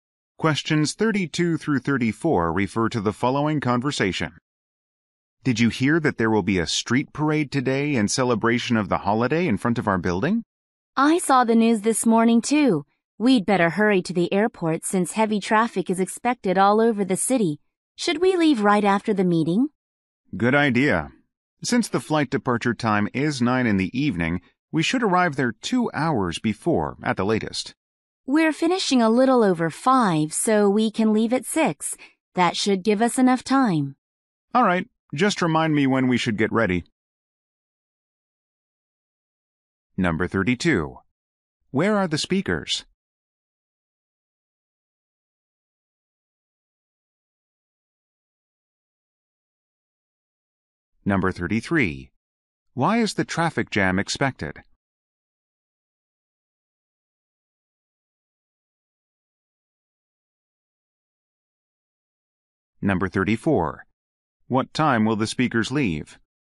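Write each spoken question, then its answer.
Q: Why is the traffic jam expected?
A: Because of a holiday street parade

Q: What time will the speakers leave?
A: At 6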